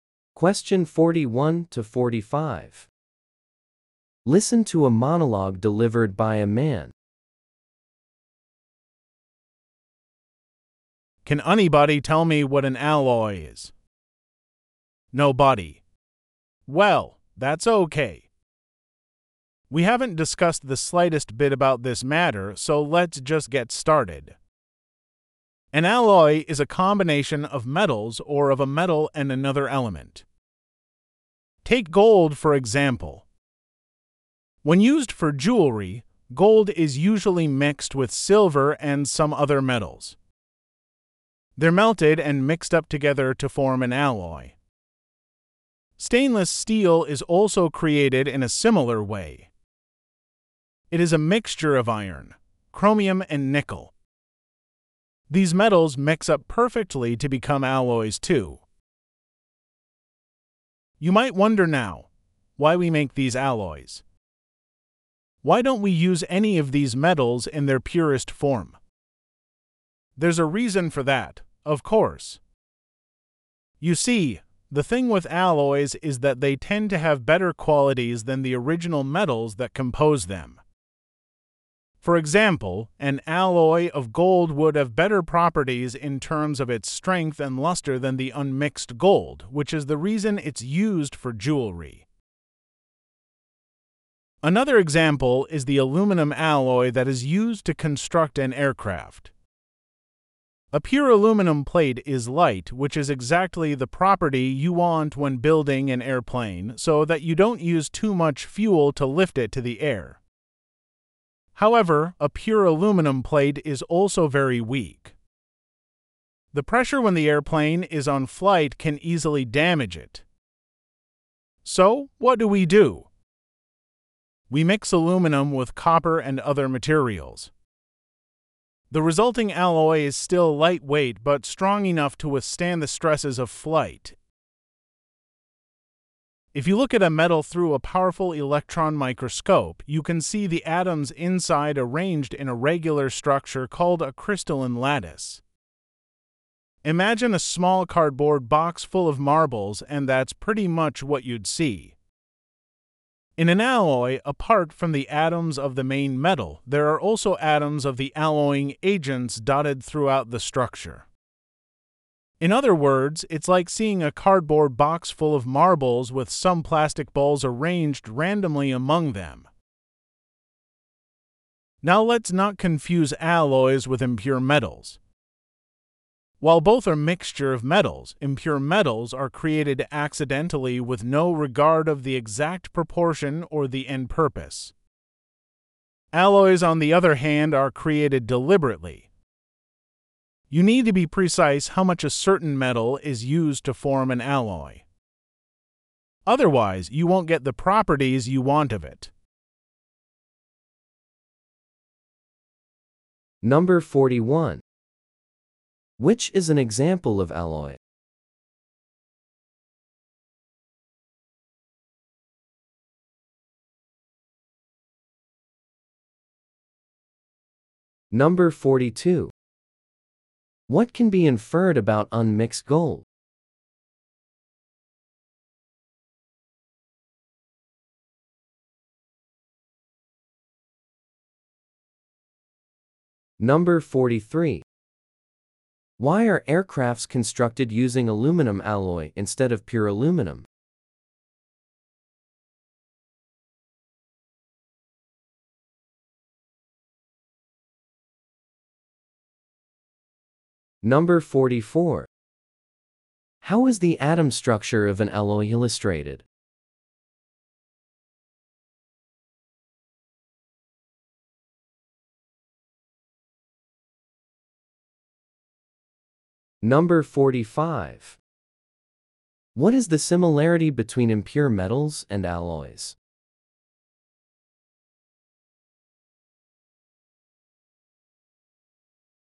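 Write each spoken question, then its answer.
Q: Which is an example of alloy?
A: Stainless steel.

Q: What can be inferred about unmixed gold?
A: It is less strong and less lustrous than gold alloy.

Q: Why are aircrafts constructed using aluminum alloy instead of pure aluminum?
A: Pure aluminum is too weak; the alloy is light but strong.

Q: How is the atom structure of an alloy illustrated?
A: As a cardboard box of marbles with some plastic balls mixed in.

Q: What is the similarity between impure metals and alloys?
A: Both are mixtures of metals.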